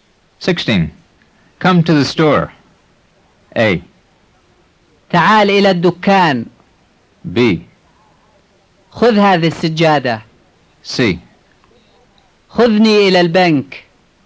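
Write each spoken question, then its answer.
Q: Come to the store.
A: A: تعال إلى الدكان.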